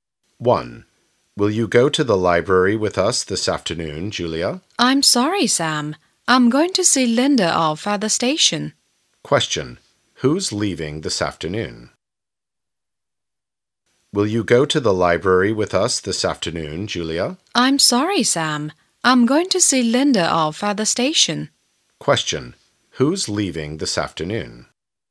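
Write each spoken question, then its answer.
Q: Who's leaving this afternoon?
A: Linda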